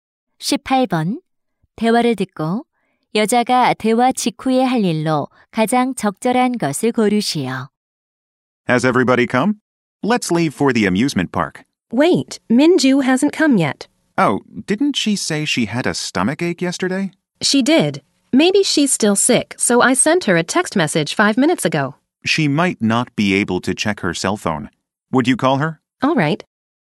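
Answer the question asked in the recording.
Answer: 민주에게 전화하기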